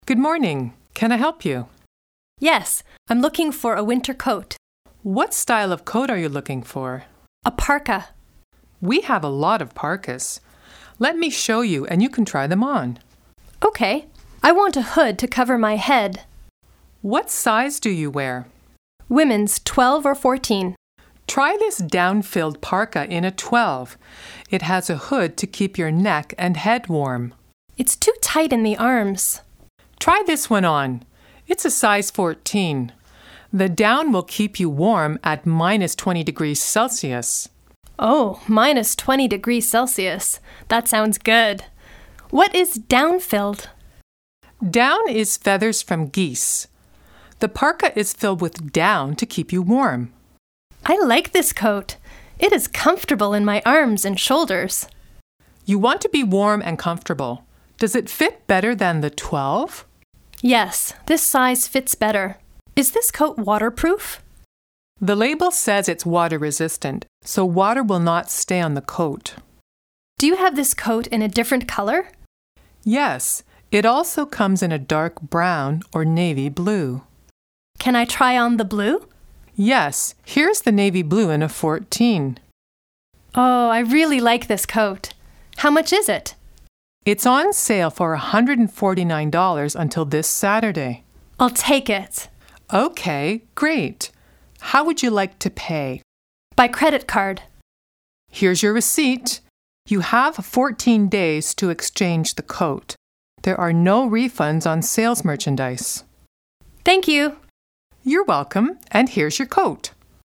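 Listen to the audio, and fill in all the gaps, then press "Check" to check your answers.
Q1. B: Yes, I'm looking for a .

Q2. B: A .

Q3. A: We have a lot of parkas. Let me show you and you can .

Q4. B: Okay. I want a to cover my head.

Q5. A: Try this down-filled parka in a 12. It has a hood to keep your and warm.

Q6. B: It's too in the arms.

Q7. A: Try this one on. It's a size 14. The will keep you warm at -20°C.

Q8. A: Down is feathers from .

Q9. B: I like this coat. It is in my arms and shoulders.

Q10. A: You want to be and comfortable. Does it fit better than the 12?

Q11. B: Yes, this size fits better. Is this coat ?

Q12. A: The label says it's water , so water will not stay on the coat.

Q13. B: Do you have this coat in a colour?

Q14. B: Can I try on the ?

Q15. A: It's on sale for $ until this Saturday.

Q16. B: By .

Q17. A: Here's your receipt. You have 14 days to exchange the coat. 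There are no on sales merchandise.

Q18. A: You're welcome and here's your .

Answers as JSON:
{"1": "winter coat", "2": "parka", "3": "try them on", "4": "hood", "5": "neck; head", "6": "tight", "7": "down", "8": "geese", "9": "comfortable", "10": "warm", "11": "waterproof", "12": "resistant", "13": "different", "14": "blue", "15": "149", "16": "credit card", "17": "refunds", "18": "coat"}

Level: CLB 5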